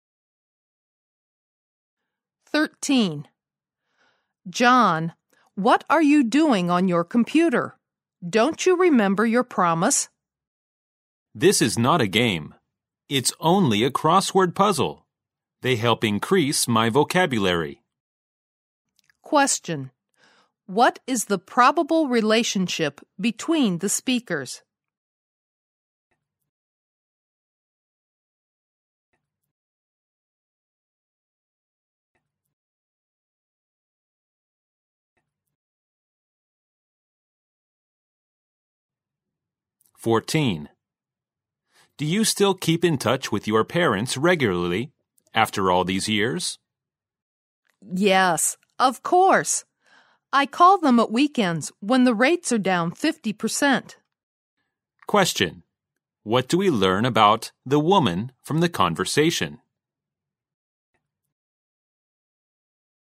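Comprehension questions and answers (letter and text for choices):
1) What do we learn about the woman from the conversation?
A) She contacts her parents occasionally.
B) She phones her parents regularly at weekends.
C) She visits her parents at weekends when the fares are down.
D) She often calls her parents regardless of the rates.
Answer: B) She phones her parents regularly at weekends.

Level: 大学英语四级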